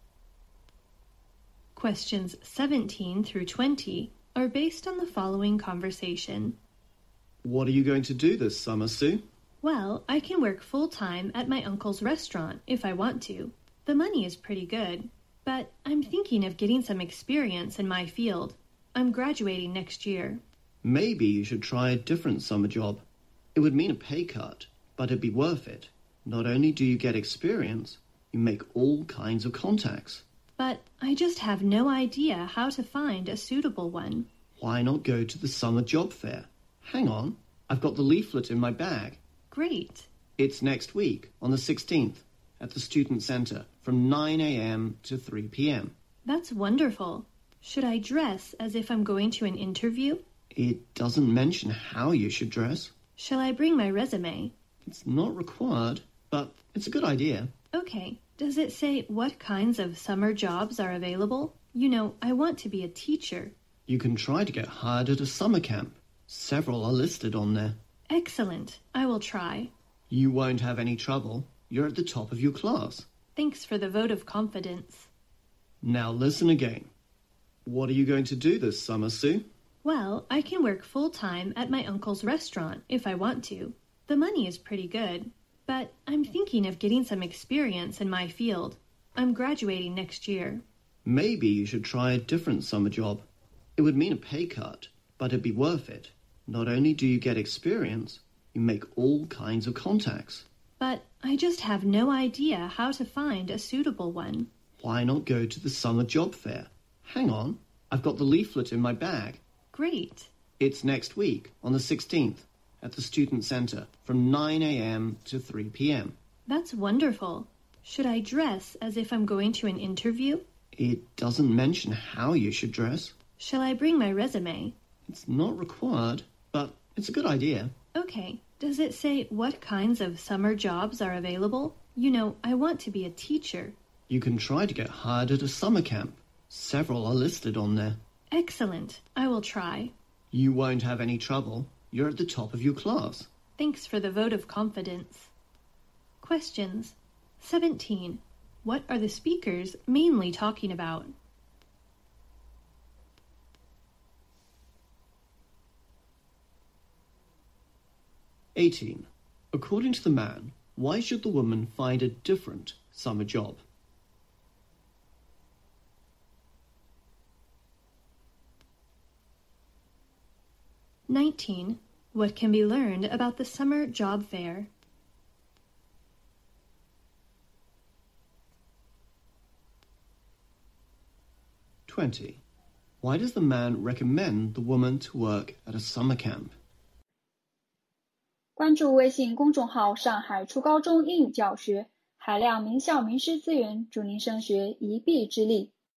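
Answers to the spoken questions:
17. Finding a summer job
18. To get experience and make contacts
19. It is on the 16th at the Student Center, from 9 a.m. to 3 p.m.
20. She wants to be a teacher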